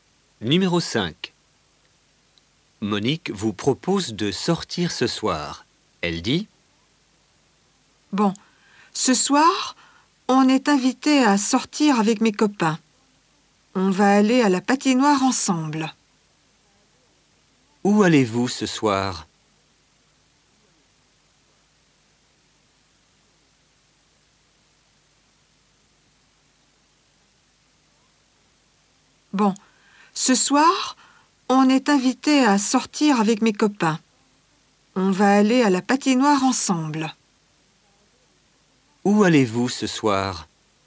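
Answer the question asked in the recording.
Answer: À la patinoire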